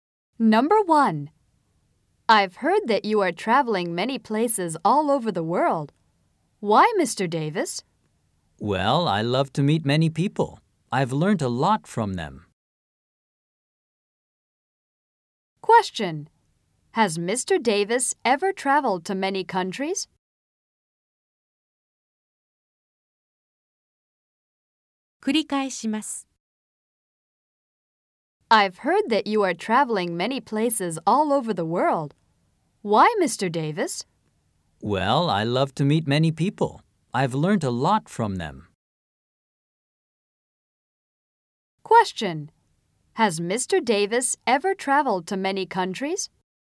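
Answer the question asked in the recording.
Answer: Yes, he has.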